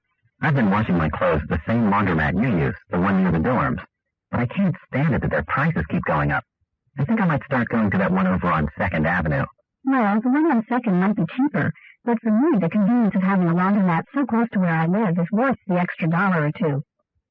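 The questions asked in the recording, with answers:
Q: What does the woman mean?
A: She prefers the nearby laundromat because its convenience is worth paying a little more.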